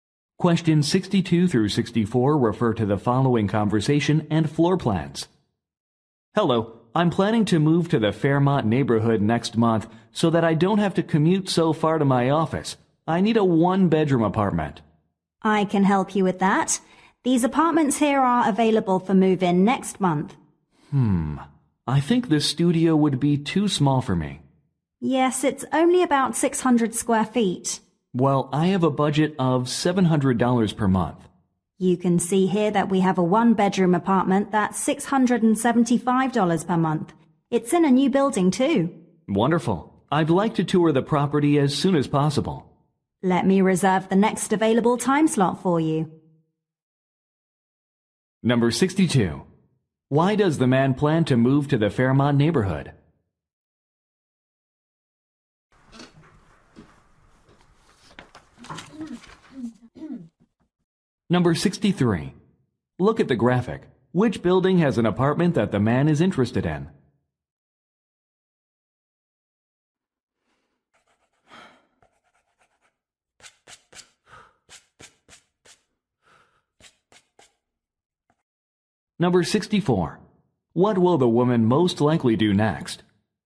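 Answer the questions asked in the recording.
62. To shorten his commute to his office
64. Reserve a time slot for a tour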